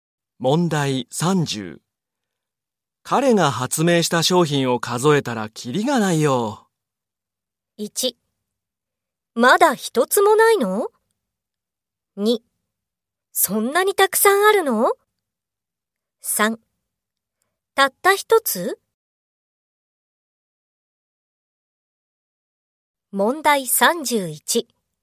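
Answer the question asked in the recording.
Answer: 2: そんなにたくさんあるの?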